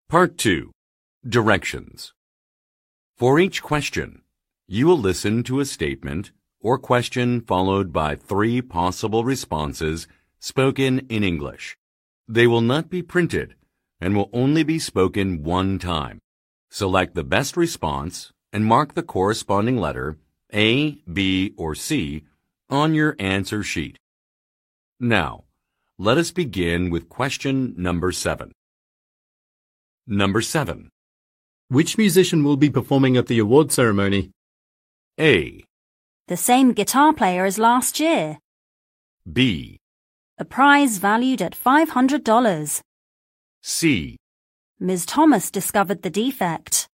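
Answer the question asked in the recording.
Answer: The same guitar player as last year.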